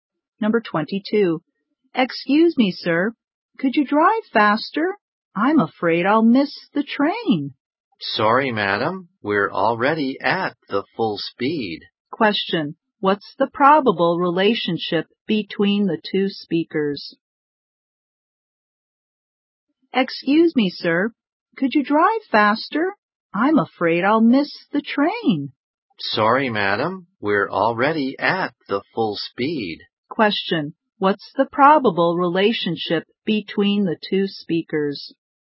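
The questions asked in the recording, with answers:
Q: What's the probable relationship between the two speakers?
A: Driver and passenger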